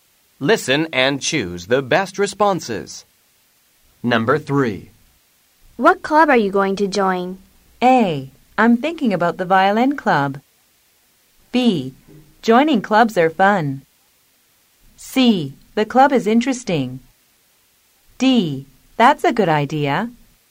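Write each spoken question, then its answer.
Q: What club are you going to join?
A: A: I'm thinking about the violin club.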